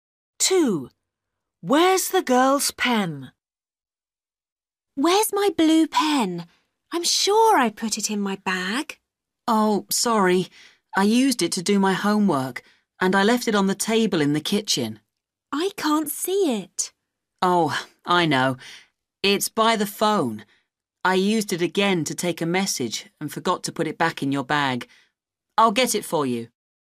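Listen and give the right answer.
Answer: by the phone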